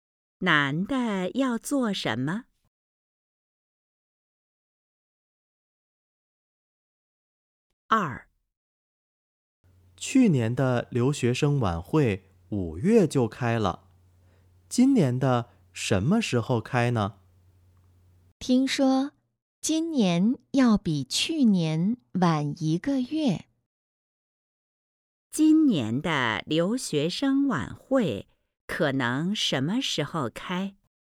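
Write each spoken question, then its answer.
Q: 今年的留学生晚会可能什么时候开?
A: 六月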